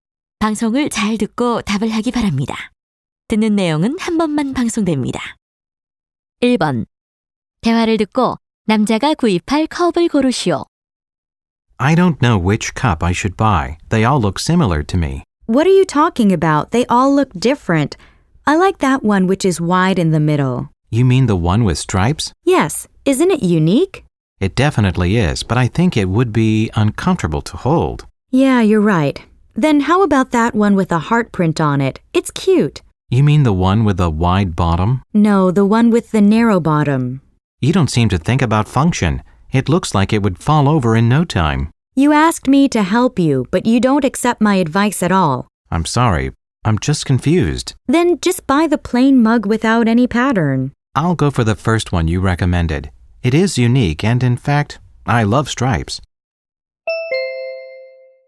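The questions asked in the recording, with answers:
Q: 대화를 듣고 남자가 구입할 컵을 고르시오.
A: 가운데가 넓은 줄무늬 컵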